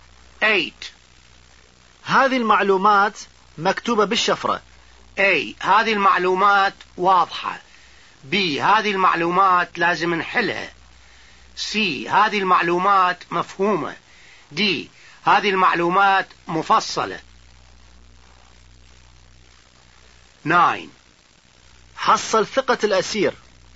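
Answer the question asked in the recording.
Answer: B: هذه المعلومات لازم نحلها.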